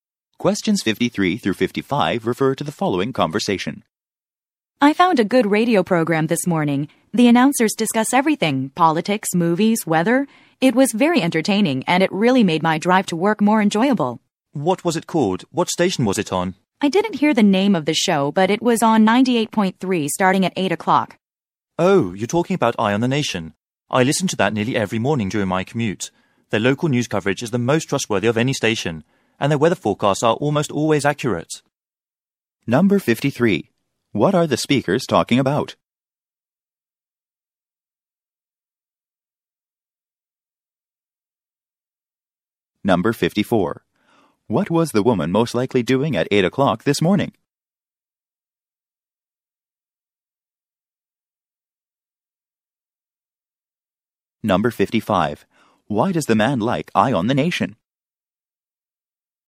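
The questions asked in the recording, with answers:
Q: What are the speakers talking about?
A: A radio program

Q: What was the woman most likely doing at 8 o'clock this morning?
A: Driving to work

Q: Why does the man like Eye on the Nation?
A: Its local news coverage is trustworthy and its weather forecasts are accurate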